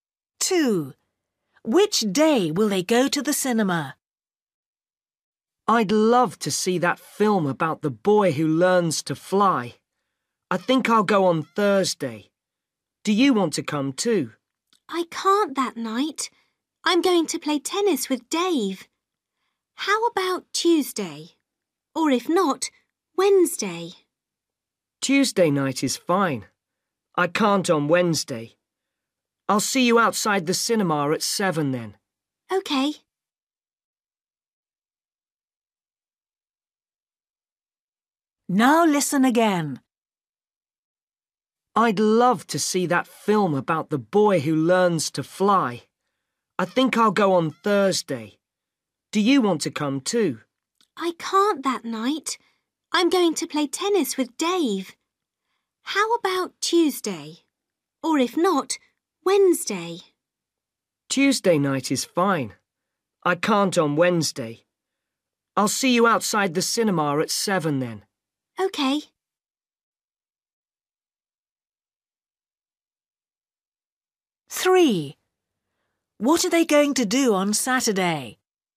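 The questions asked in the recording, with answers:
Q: Which day will they go to the cinema?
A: Tuesday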